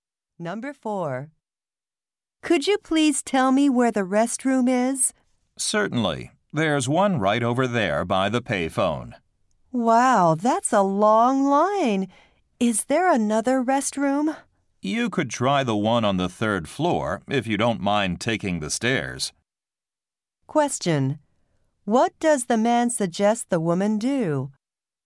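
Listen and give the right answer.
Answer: Use the restroom on the third floor.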